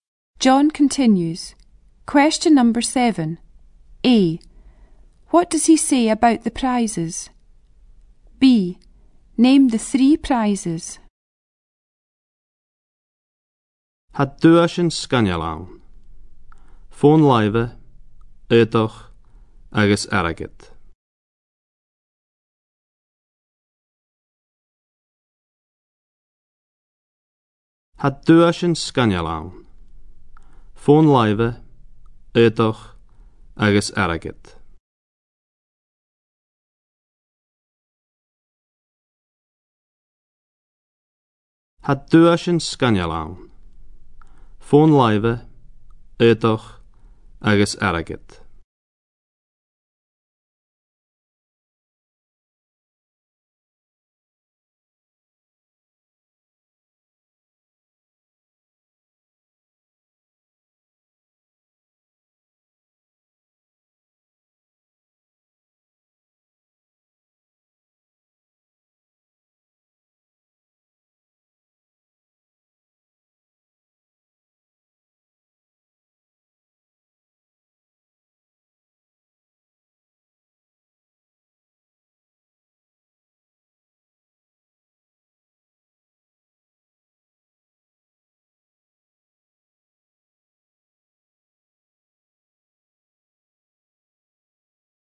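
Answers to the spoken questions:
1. They are great
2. Mobile phone, clothes and money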